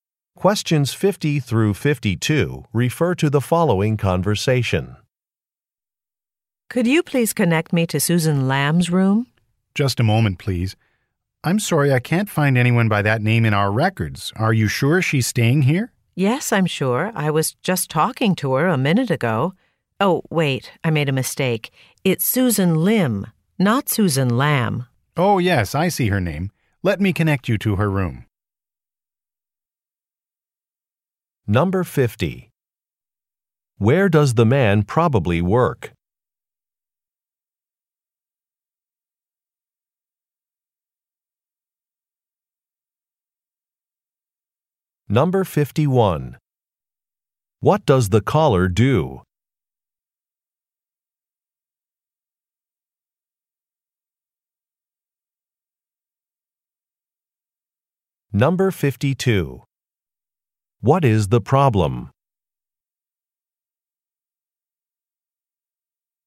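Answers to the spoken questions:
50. At a hotel
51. Asks to be connected to a guest's room
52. The caller gave the wrong name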